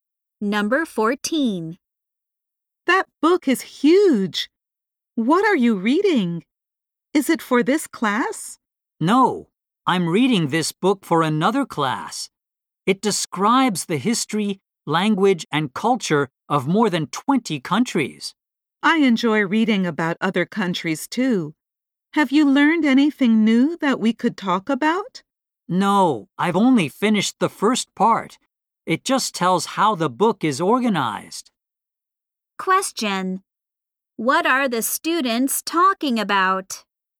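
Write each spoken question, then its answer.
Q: What are the students talking about?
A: A book about the history, language and culture of other countries.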